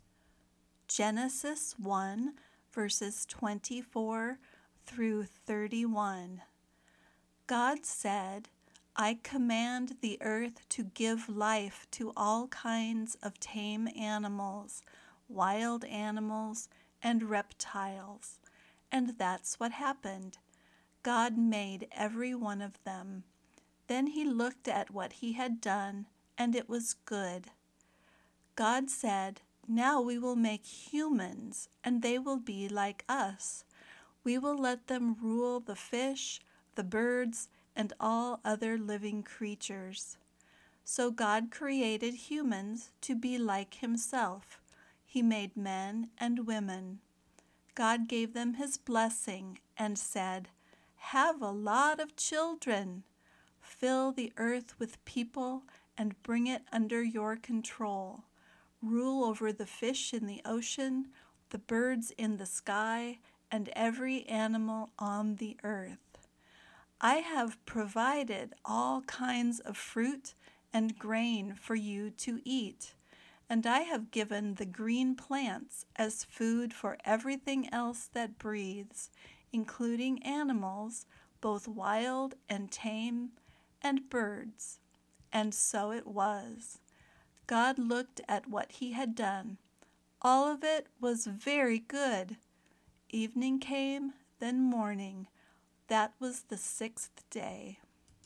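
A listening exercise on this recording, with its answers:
Find the answers to these three questions as you listen:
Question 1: What were the humans (people) like?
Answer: They were like God (created to be like himself).

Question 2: What three things did God command people to rule over?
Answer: The fish in the ocean, the birds in the sky, and every animal on the earth.

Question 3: What three things did God provide for people and all creatures to eat?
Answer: Fruit, grain, and green plants.

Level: Beginner Lesson 8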